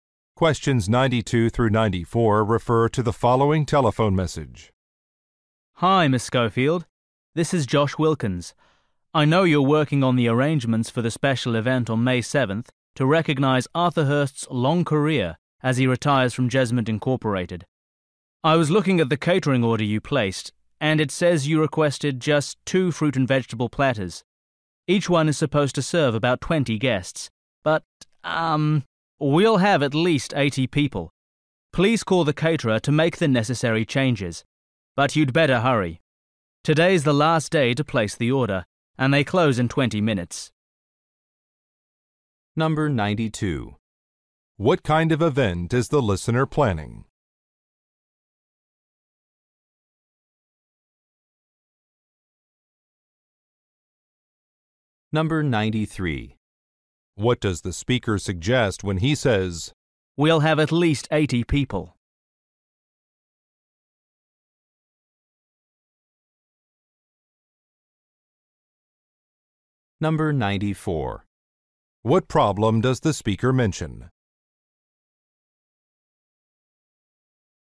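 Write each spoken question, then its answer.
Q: What kind of event is the listener planning?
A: A retirement party

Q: What does the speaker suggest when he says, "We'll have at least 80 people"?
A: More food platters are needed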